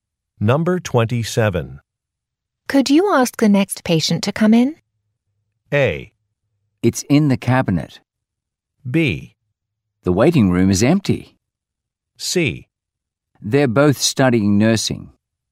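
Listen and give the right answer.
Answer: B: The waiting room is empty.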